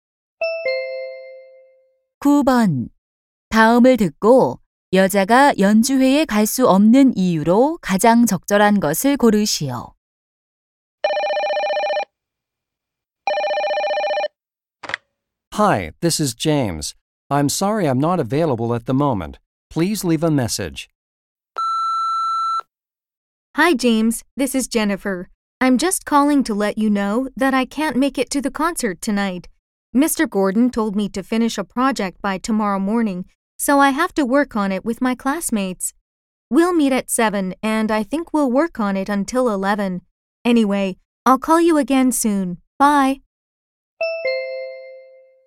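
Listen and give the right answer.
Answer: 반 친구들과 과제를 해야 해서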